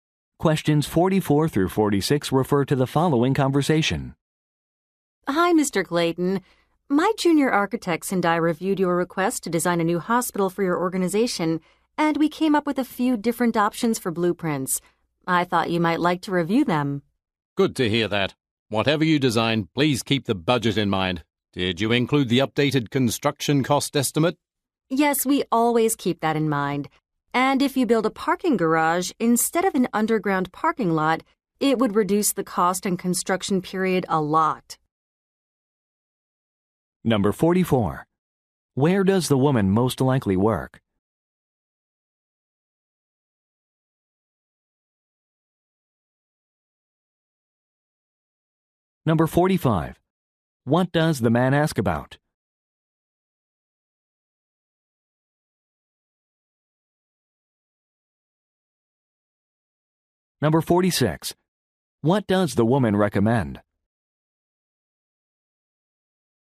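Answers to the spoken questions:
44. At an architecture firm
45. The updated construction cost estimate
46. Building a parking garage instead of an underground parking lot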